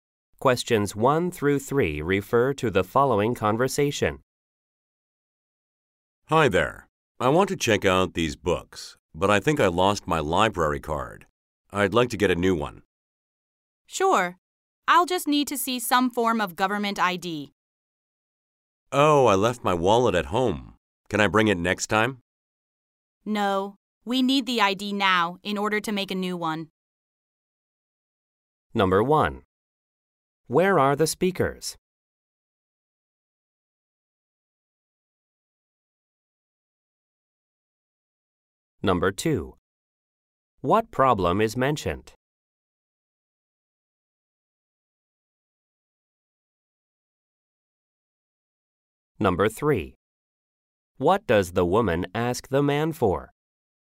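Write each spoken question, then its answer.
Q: Where are the speakers?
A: At a library

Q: What problem is mentioned?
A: The man lost his library card

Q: What does the woman ask the man for?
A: A government ID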